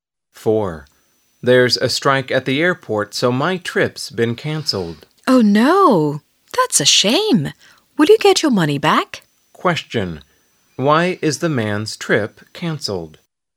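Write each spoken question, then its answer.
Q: Why is the man's trip cancelled?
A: Because of a strike at the airport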